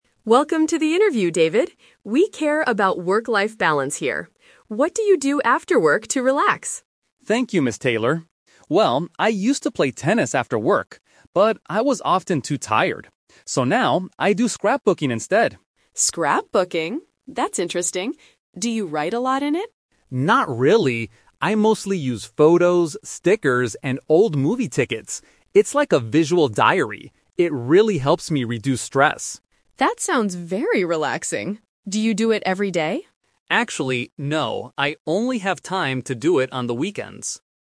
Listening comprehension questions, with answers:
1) What did David do to relax in the past?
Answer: He played tennis.

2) What does David usually put in his scrapbook?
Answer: Photos and tickets.

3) When does David work on his scrapbook?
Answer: Only on the weekends.

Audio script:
Taylor: Welcome to the interview, David. We care about work-life balance here. What do you do after work to relax?
David: Thank you, Ms. Taylor. Well, I used to play tennis after work. But I was often too tired. So now, I do scrapbooking instead.
Ms. Taylor: Scrapbooking? That's interesting. Do you write a lot in it?
David: Not really. I mostly use photos, stickers, and old movie tickets. It's like a visual diary. It really helps me reduce stress.
Ms. Taylor: That sounds very relaxing. Do you do it every day?
David: Actually, no. I only have time to do it on the weekends.